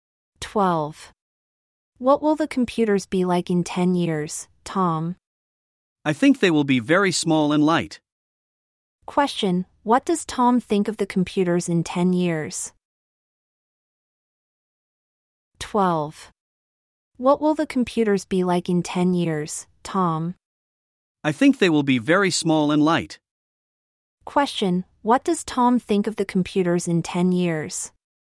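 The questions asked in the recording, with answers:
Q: Question,What does Tom think of the computers in 10 years?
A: They will be very small and light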